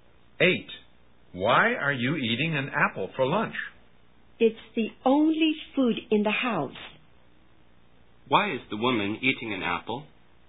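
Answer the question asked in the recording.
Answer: It's the only food in the house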